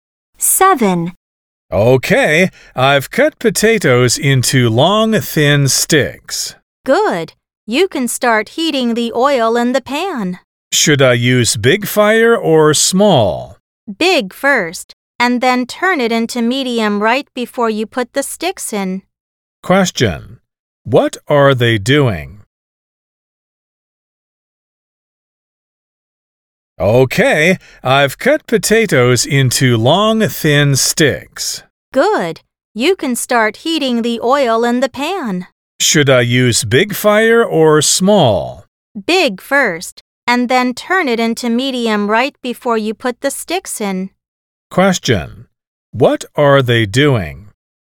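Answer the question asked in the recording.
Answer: Making French fries.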